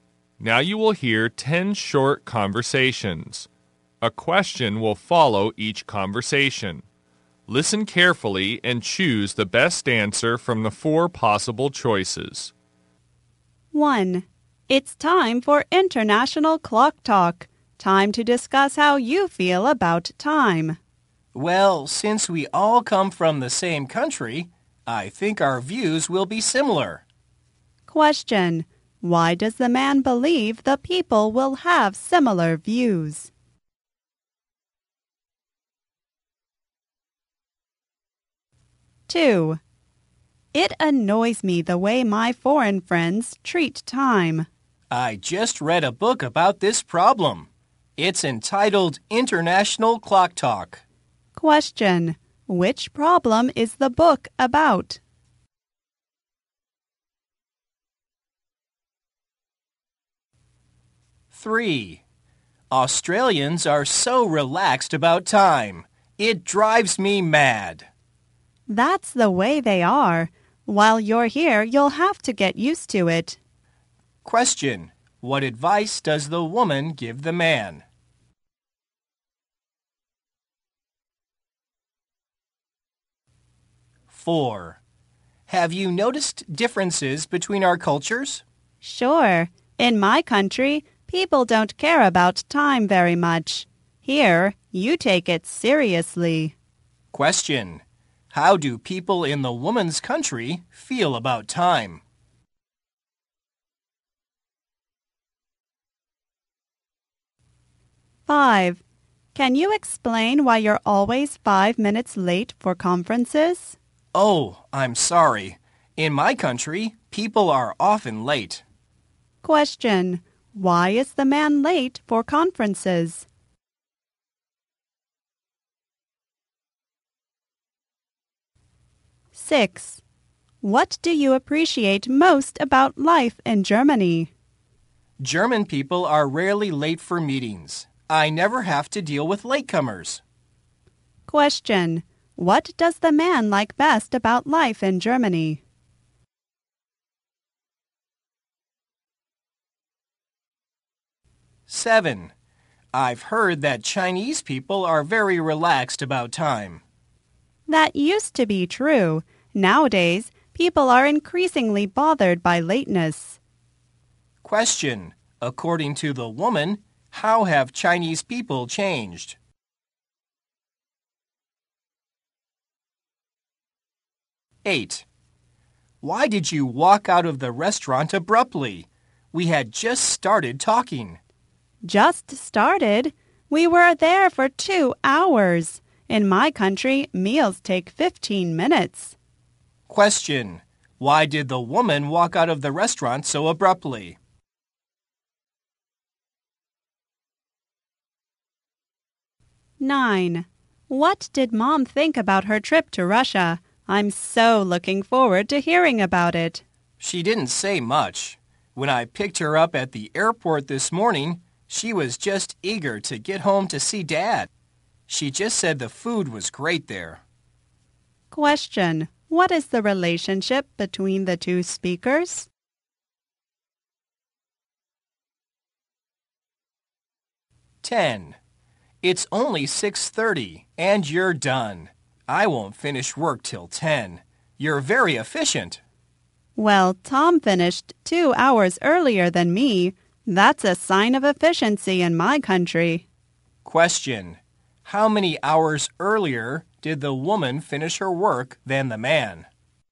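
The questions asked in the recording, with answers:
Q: Why does the man believe the people will have similar views?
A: Because they all come from the same country

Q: Which problem is the book about?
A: The way foreign people treat time

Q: What advice does the woman give the man?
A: Get used to Australians' relaxed attitude to time

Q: How do people in the woman's country feel about time?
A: They don't care about time very much

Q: Why is the man late for conferences?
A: In his country people are often late

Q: What does the man like best about life in Germany?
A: Germans are rarely late for meetings

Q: According to the woman, how have Chinese people changed?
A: They are increasingly bothered by lateness

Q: Why did the woman walk out of the restaurant so abruptly?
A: In her country meals take only 15 minutes, and they had been there 2 hours

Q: What is the relationship between the two speakers?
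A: Brother and sister (siblings)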